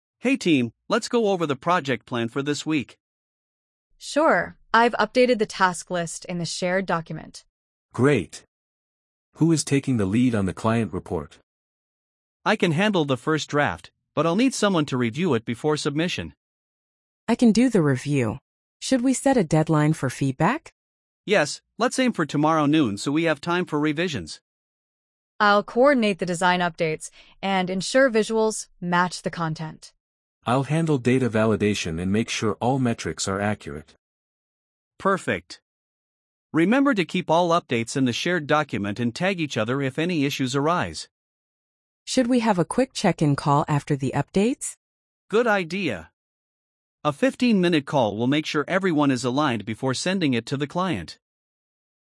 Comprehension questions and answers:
Complete the phrases as you listen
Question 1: Hey team, let's go over the project ______ for this week.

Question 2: I've updated the task list in the ______ document.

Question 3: Who is taking the ______ on the client report?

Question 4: I can handle the first draft, but I'll need someone to ______ it before submission.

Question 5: Should we set a ______ for feedback?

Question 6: Let's aim for tomorrow noon so we have time for ______.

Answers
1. plan
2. shared
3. lead
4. review
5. deadline
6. revisions

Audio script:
Liam: Hey team, let's go over the project plan for this week.
Maya: Sure, I've updated the task list in the shared document.
Raj: Great! Who is taking the lead on the client report?
Liam: I can handle the first draft, but I'll need someone to review it before submission.
Priya: I can do the review. Should we set a deadline for feedback?
Liam: Yes, let's aim for tomorrow noon so we have time for revisions.
Maya: I'll coordinate the design updates and ensure visuals match the content.
Raj: I'll handle data validation and make sure all metrics are accurate.
Liam: Perfect. Remember to keep all updates in the shared document and tag each other if any issues arise.
Priya: Should we have a quick check-in call after the updates?
Liam: Good idea. A 15-minute call will make sure everyone is aligned before sending it to the client.